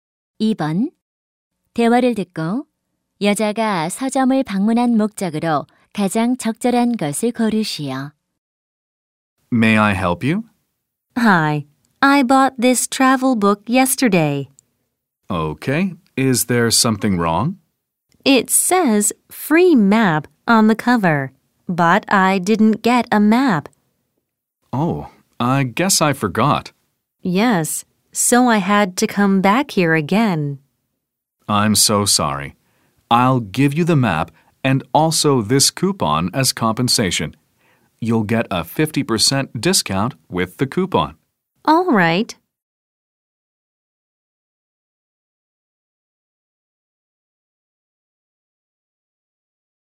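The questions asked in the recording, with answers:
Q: 대화를 듣고 여자가 서점을 방문한 목적으로 가장 적절한 것을 고르시오.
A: 받지 못한 무료 지도를 받기 위해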